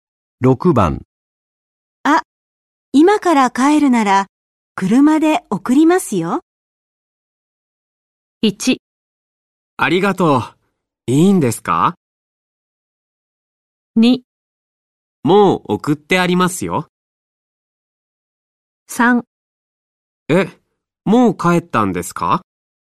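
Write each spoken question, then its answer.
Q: あ、今から帰るなら車で送りますよ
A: 1: ありがとう、いいんですか

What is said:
1
ありがとう、いいんですか。
2
もう送ってありますよ。
3
えっ、もう帰ったんですか。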